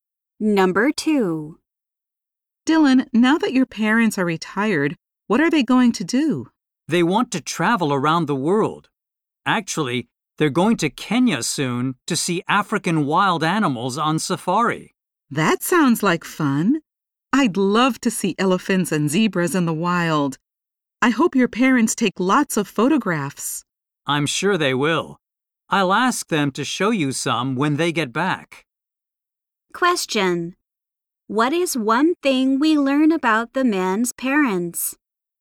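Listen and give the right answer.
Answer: They are going to Kenya to see wild animals on safari.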